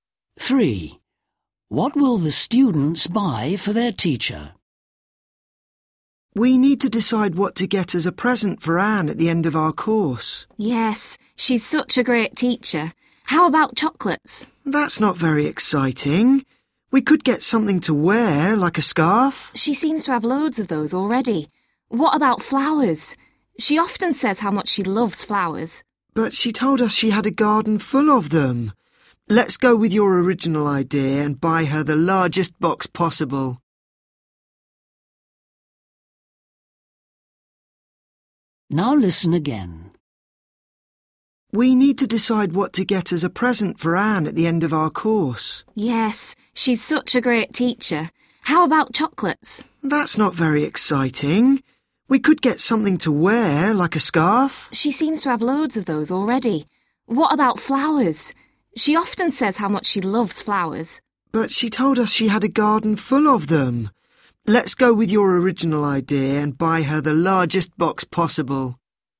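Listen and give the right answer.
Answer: a (large) box of chocolates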